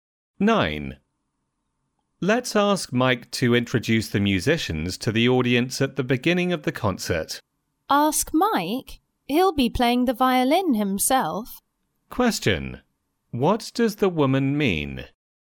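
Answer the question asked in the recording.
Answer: Mike can't introduce the musicians because he will be playing the violin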